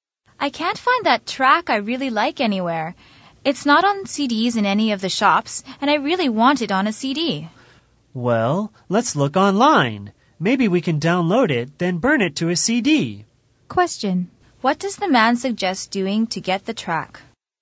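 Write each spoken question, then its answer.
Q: What does the man suggest doing to get the track?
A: Download it online and burn it to a CD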